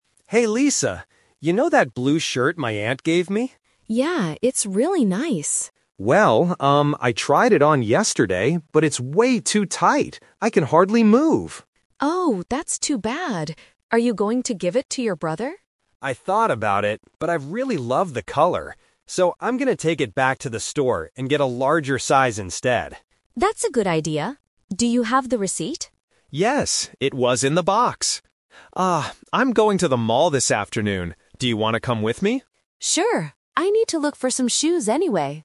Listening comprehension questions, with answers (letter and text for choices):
Listen to the conversation between two friends. Read the questions and choose the correct answer (A, B, or C).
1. What is the problem with the man's shirt?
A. He does not like the color.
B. It is too small for him.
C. It is missing a button.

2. What does the man decide to do with the shirt?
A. Give it to his younger brother.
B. Keep it in the box.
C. Exchange it for a bigger one.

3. Why does the man invite Lisa to go with him?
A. He wants her to go to the mall with him.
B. He needs her to pay for the new shirt.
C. He wants to buy her a pair of shoes.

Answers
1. B. It is too small for him.
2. C. Exchange it for a bigger one.
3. A. He wants her to go to the mall with him.

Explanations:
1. The man says the shirt is "way too tight," which means it is too small. Why the trap is wrong: Option (A) is a trap. He mentions the color, but he says he "really loves the color," not that he dislikes it. Option (C) is not mentioned at all.
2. The man says, "I'm going to take it back to the store and get a larger size instead." This means he wants to exchange it. Why the trap is wrong: Option (A) is the main trap. Lisa asks if he will give it to his brother, and he says "I thought about it, but..." This is the "Twist" technique—he planned to do it, but changed his mind.
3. He says, "I'm going to the mall this afternoon. Do you want to come with me?" He simply wants some company. Why the trap is wrong: Option (C) is a trap. Lisa mentions that she needs to "look for some shoes," but the man is not buying them for her. Option (B) is not mentioned.

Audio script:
Tom: Hey Lisa! You know that blue shirt my aunt gave me?
Lisa: Yeah, it's really nice.
Tom: Well, um, I tried it on yesterday, but it's way too tight. I can hardly move!
Lisa: Oh, that's too bad. Are you going to give it to your brother?
Tom: I thought about it, but I really love the color. So, I'm going to take it back to the store and get a larger size instead.
Lisa: That's a good idea. Do you have the receipt?
Tom: Yes, it was in the box. Ah, I'm going to the mall this afternoon. Do you want to come with me?
Lisa: Sure! I need to look for some shoes anyway.